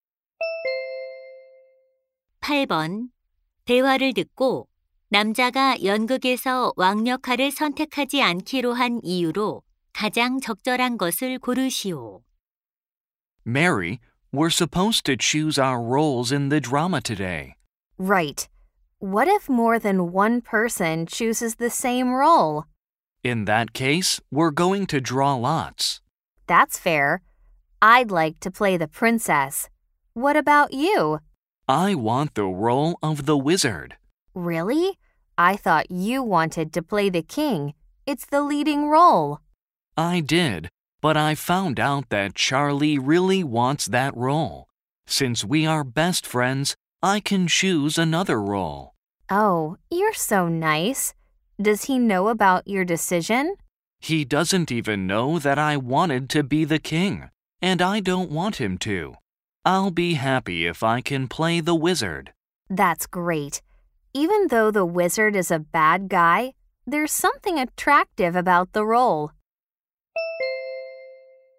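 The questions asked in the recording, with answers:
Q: 대화를 듣고 남자가 연극에서 왕 역할을 선택하지 않기로 한 이유로 가장 적절한 것을 고르시오.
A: 친한 친구 찰리가 그 역할을 원해서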